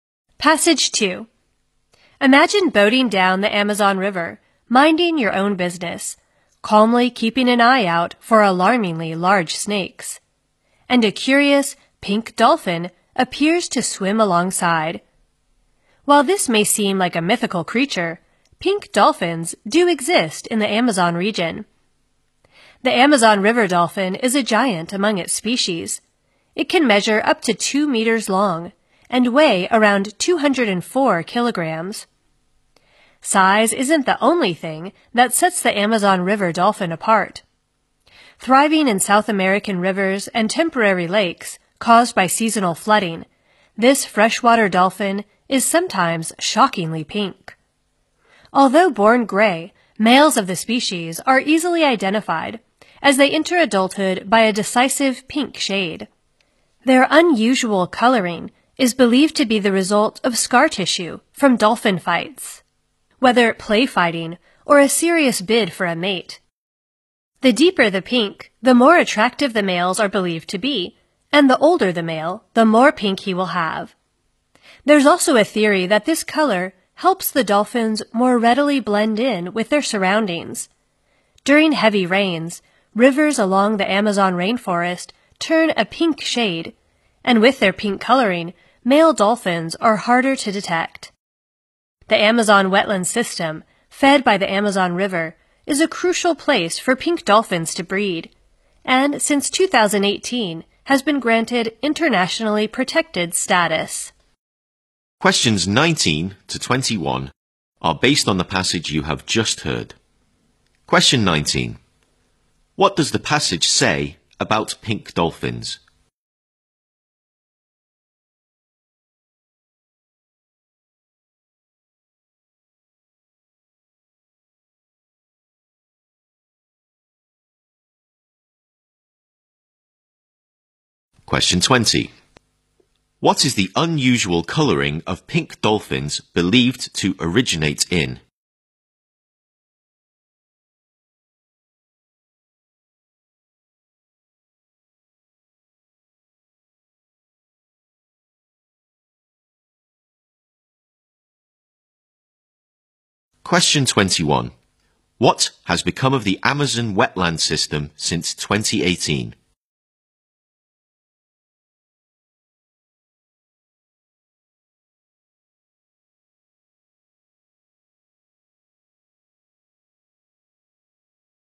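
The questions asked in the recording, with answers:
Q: What is the unusual coloring of pink dolphins believed to originate in?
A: Scar tissue from dolphin fights

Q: What has become of the Amazon wetland system since 2018?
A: It has been granted internationally protected status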